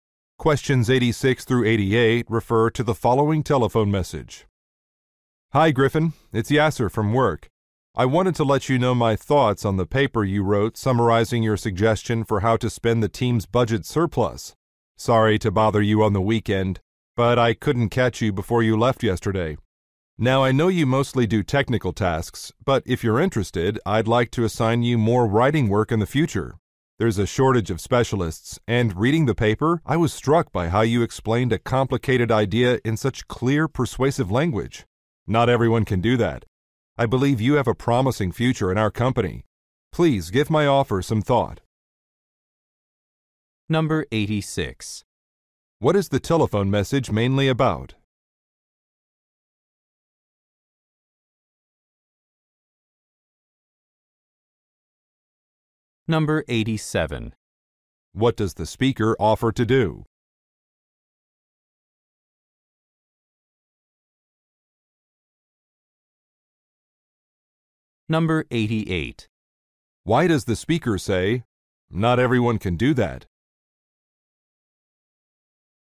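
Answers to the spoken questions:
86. Feedback on a paper Griffin wrote
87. Assign Griffin more writing work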